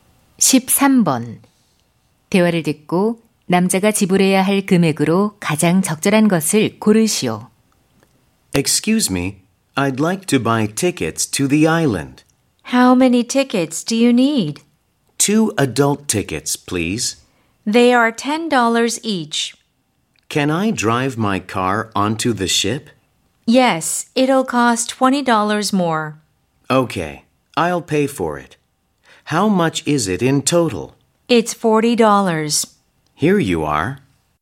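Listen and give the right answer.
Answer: $40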